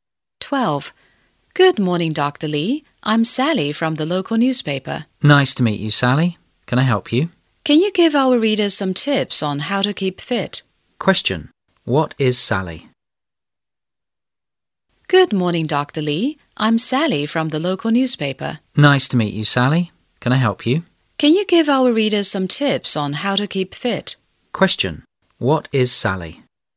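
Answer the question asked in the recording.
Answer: A reporter for the local newspaper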